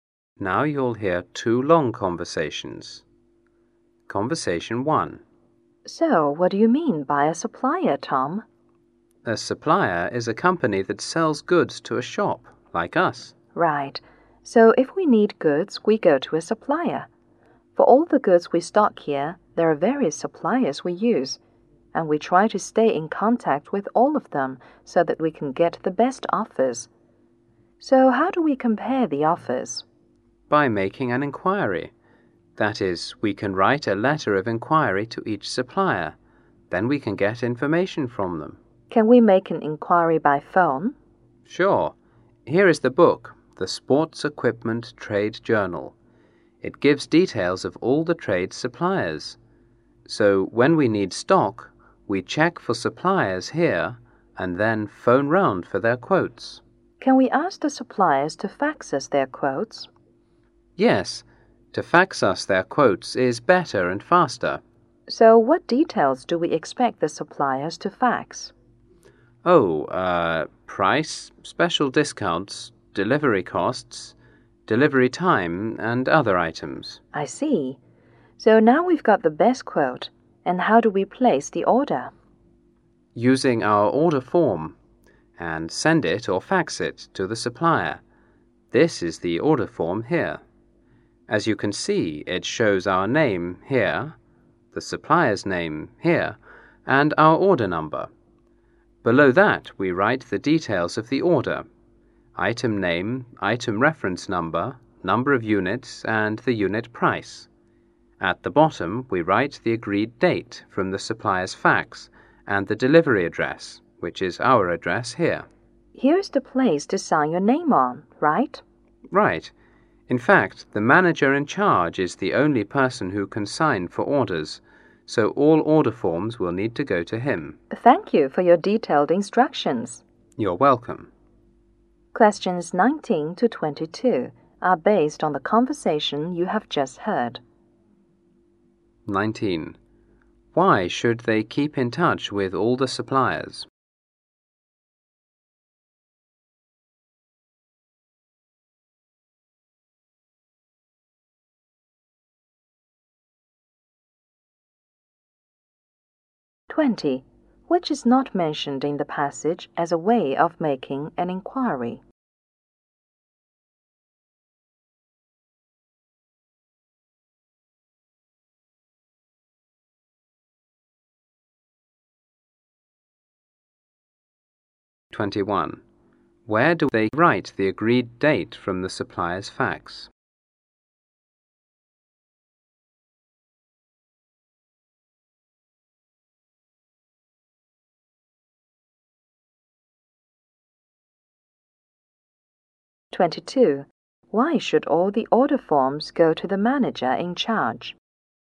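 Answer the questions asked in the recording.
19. To get the best offers.
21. At the bottom of the order form.
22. He is the only person who can sign orders.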